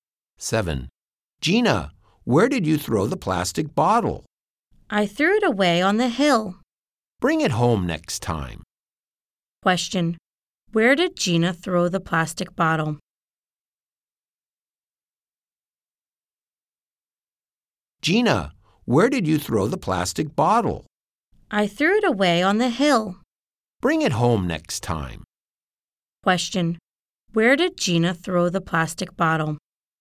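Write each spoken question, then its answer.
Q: Question. Where did Gina throw the plastic bottle?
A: On the hill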